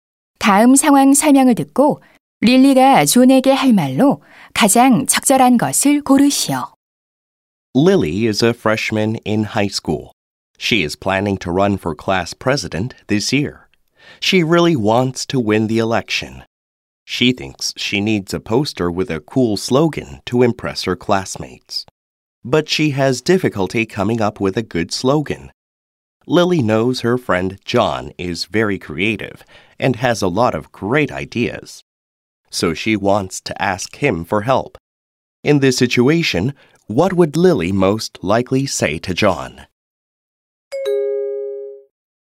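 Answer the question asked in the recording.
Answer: Could you help me come up with a cool slogan for my campaign poster?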